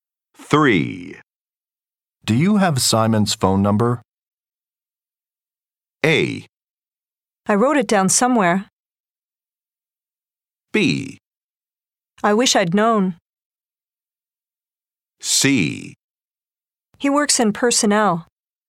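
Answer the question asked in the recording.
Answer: A: I wrote it down somewhere.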